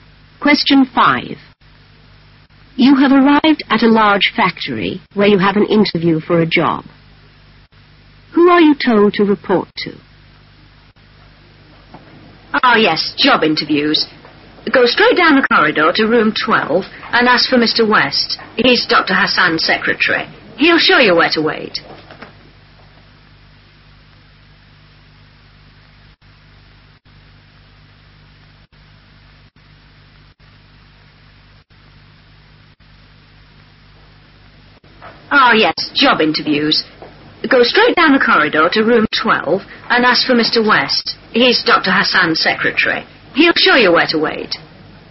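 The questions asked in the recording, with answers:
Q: Who are you told to report to?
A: Mr. West, Dr. Hassan's secretary, in room 12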